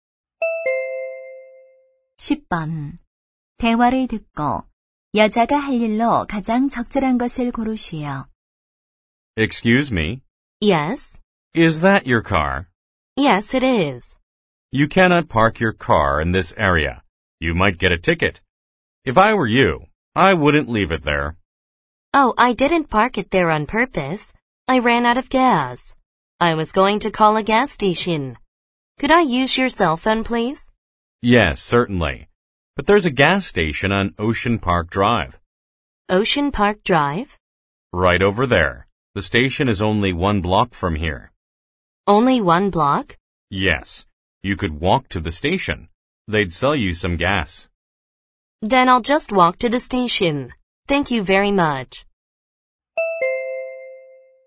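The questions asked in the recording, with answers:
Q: 대화를 듣고 여자가 할 일로 가장 적절한 것을 고르시오.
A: 주유소까지 걸어가기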